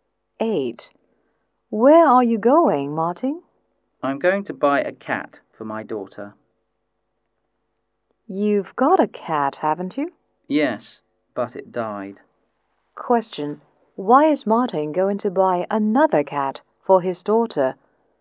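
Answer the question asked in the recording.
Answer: Because their cat died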